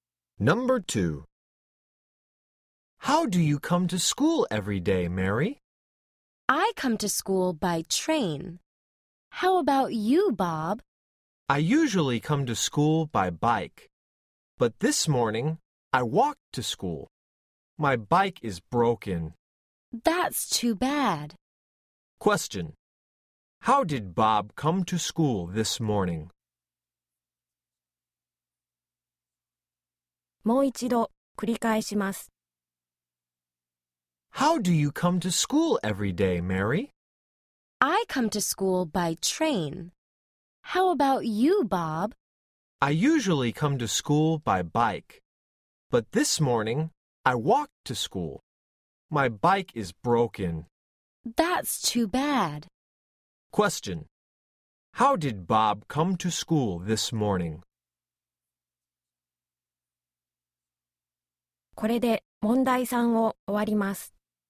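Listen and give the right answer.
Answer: He walked to school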